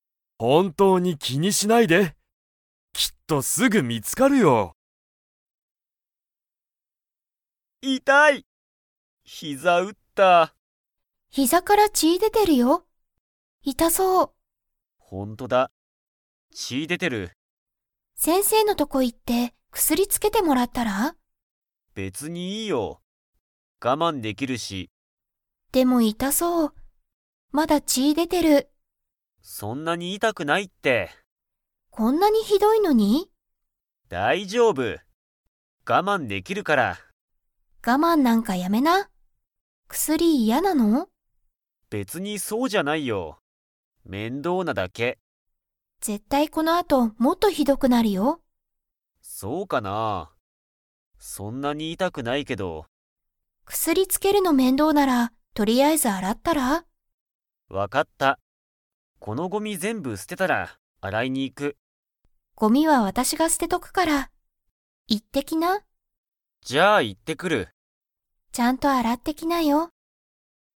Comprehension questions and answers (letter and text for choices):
Comprehension Quiz (Skip if you don't understand the conversation yet)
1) けんたの から血ちが出でてる。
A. 頭あたま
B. 顔かお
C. おなか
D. 膝ひざ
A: D. 膝ひざ

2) けんたはごみを捨すててから、洗あらいに行いきますか?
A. はい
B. いいえ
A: B. いいえ

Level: Level 4